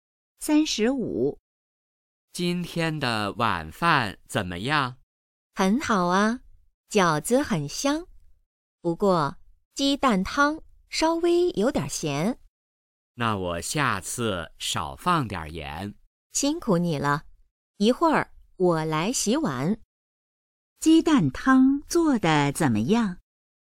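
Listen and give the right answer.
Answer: 有点咸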